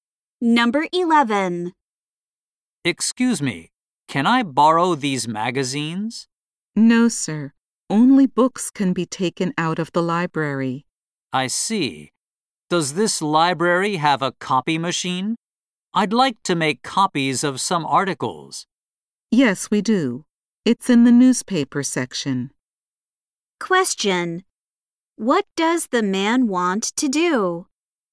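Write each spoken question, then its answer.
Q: What does the man want to do?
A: Make copies of some articles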